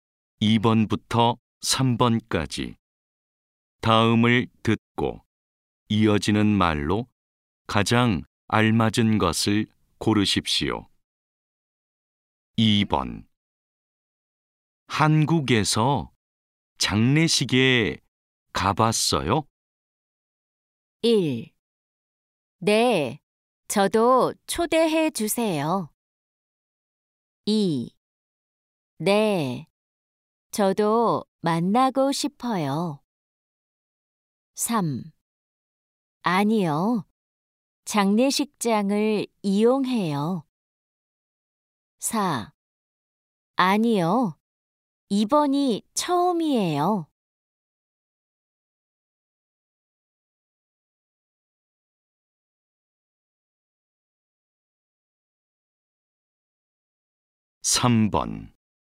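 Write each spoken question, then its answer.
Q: 한국에서 장례식에 가봤어요?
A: 4: 아니요, 이번이 처음이에요.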